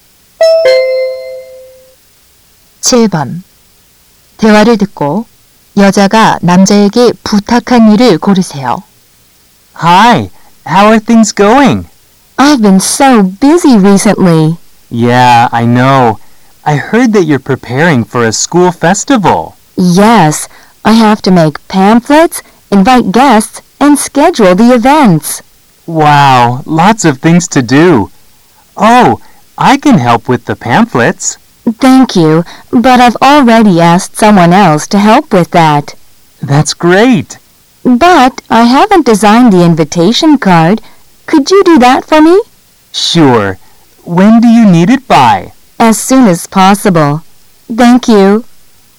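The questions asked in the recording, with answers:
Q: 대화를 듣고 여자가 남자에게 부탁한 일을 고르세요.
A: 초대장 디자인하기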